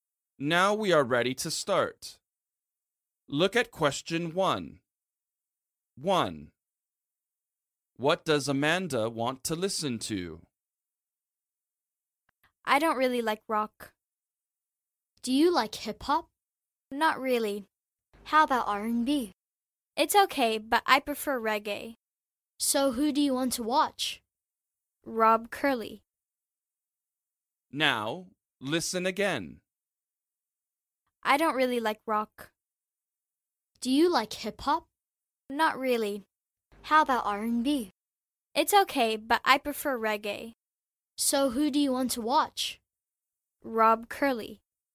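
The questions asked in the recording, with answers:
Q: What does Amanda want to listen to?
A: reggae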